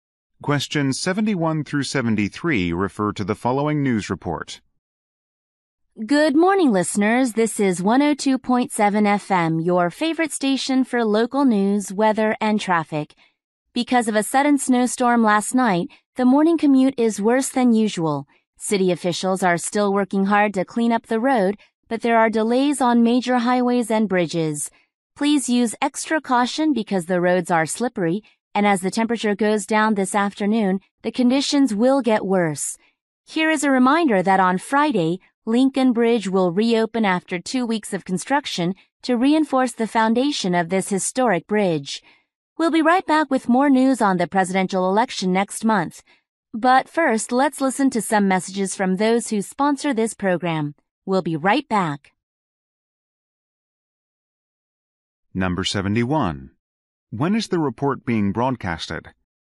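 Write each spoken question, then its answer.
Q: When is the report being broadcasted?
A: In the morning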